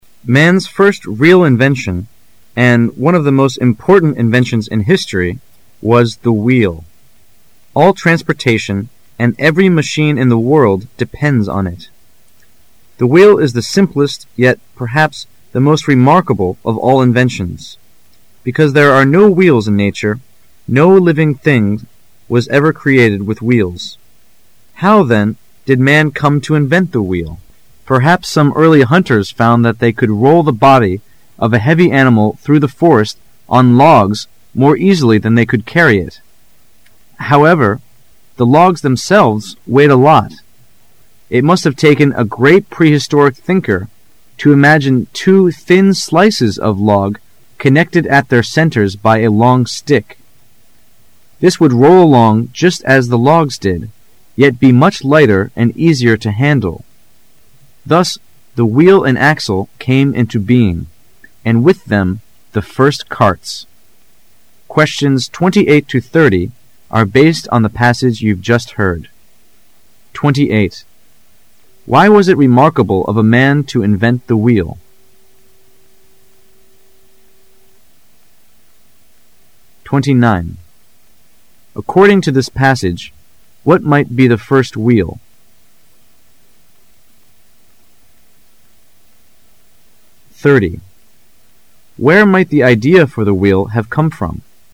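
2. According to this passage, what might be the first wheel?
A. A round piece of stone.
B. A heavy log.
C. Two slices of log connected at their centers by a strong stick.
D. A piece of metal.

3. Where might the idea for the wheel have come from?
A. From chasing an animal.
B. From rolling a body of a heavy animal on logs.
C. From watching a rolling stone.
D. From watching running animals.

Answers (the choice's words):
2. Two slices of log connected at their centers by a strong stick.
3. From rolling a body of a heavy animal on logs.

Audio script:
[解析] 28-30 Man's first real invention, and one of the most important inventions in history, was the wheel. All transportation and every machine in the world depend on it. The wheel is the simplest yet perhaps the most remarkable of all inventions. Because there are no wheels in nature--no living things was ever created with wheels. How, then, did man come to invent the wheel? 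Perhaps some early hunters found that they could roll the body of a heavy animal through the forest on logs more easily than they could carry it. However, the logs themselves weighed a lot. It must have taken a great prehistoric thinker to imagine two thin slices of log connected at their centers by a strong stick. This would roll along just as the logs did, yet be much lighter and easier to handle. Thus the wheel and axle came into being, and with them the first carts. Questions 28 to 30 are based on the passage you've just heard. Why was it remarkable of man to invent the wheel?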